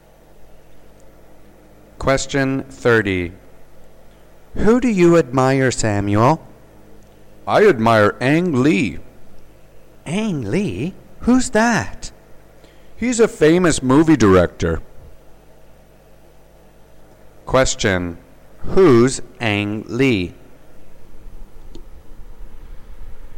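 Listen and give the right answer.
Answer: A famous movie director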